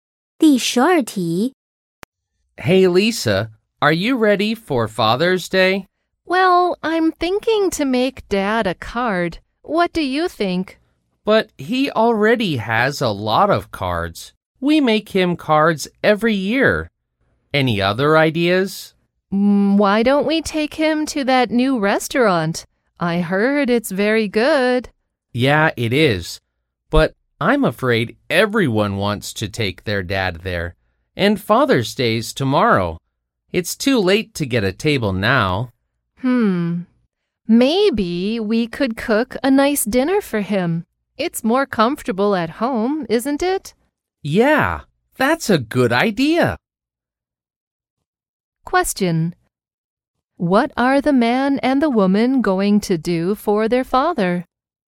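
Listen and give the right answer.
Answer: Cook a nice dinner for him at home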